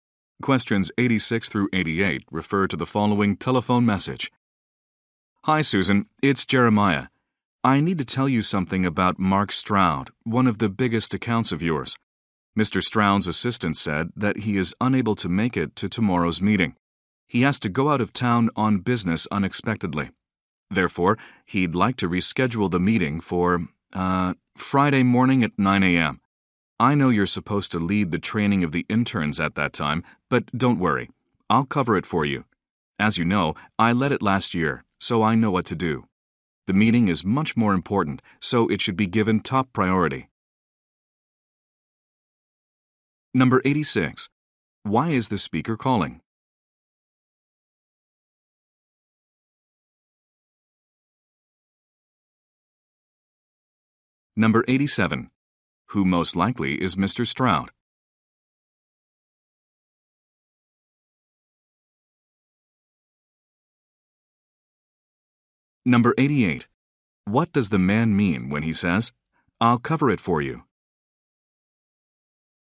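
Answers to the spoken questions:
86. To say a client wants to reschedule a meeting
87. One of Susan's biggest clients
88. He will lead the intern training in her place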